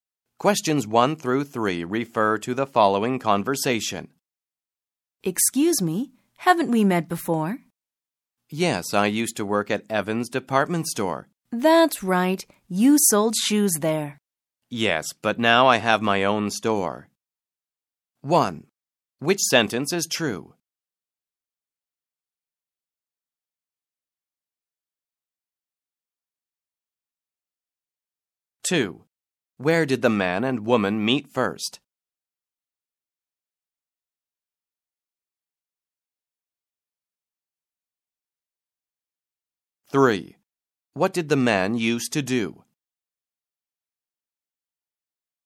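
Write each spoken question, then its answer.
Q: Where did the man and woman meet first?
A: At Evans Department Store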